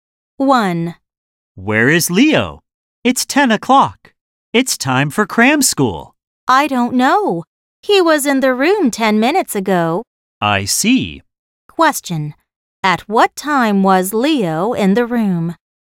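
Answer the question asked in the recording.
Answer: 9:50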